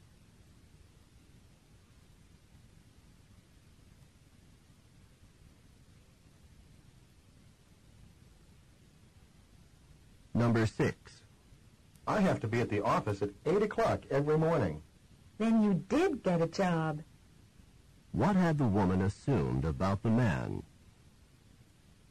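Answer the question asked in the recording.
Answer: That he had not gotten a job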